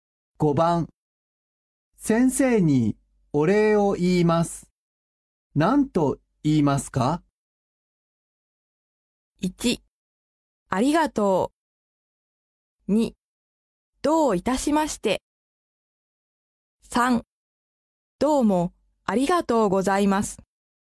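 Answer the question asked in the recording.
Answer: 3: どうもありがとうございます。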